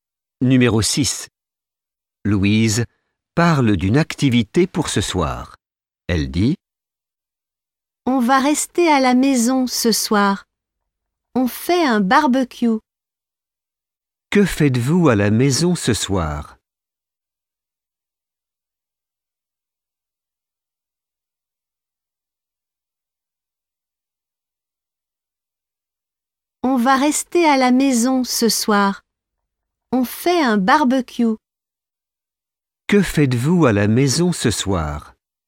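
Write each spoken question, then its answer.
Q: Que faites-vous à la maison ce soir ?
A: Un barbecue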